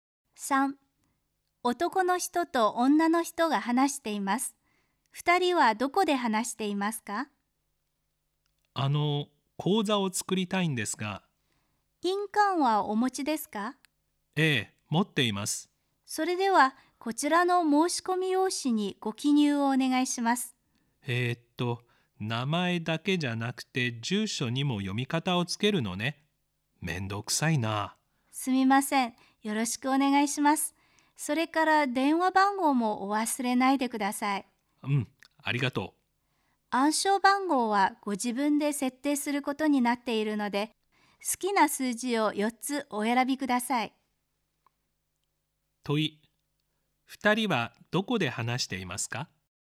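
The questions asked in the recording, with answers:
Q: 問い、2人はどこで話していますか?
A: 銀行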